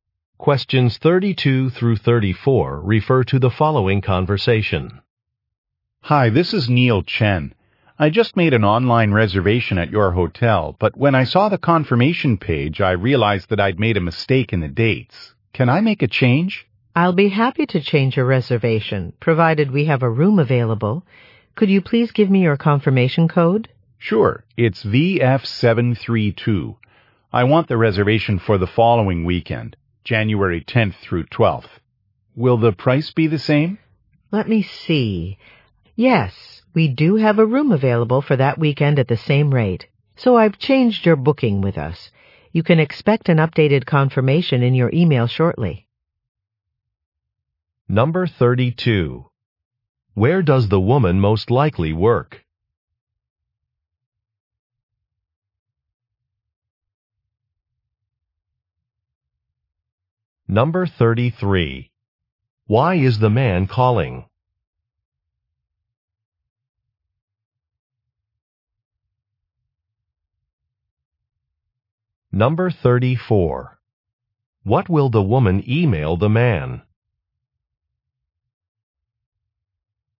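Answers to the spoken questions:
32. At a hotel
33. To change the dates of his reservation
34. An updated confirmation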